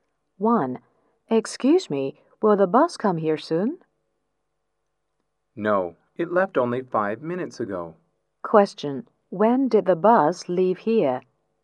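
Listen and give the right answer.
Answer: 5 minutes ago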